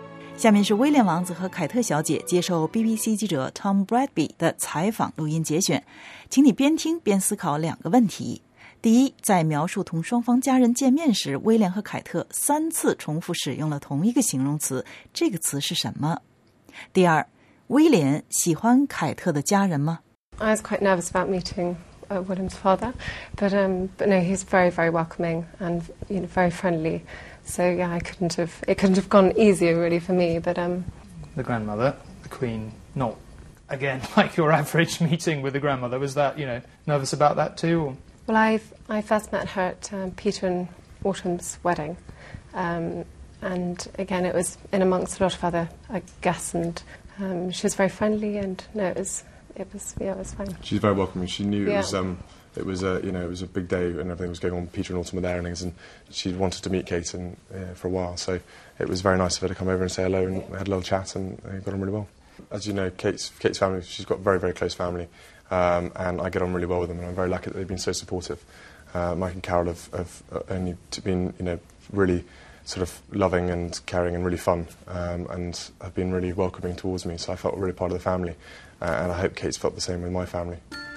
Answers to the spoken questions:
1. 这个词就是 welcoming.
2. Yes, he said that he was very lucky as he felt really part of the family.